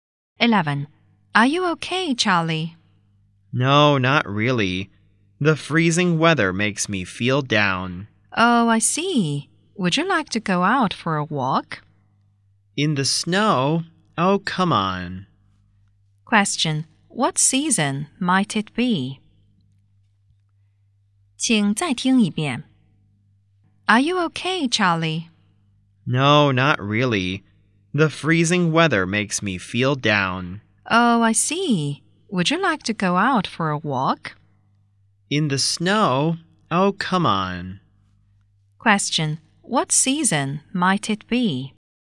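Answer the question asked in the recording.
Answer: Winter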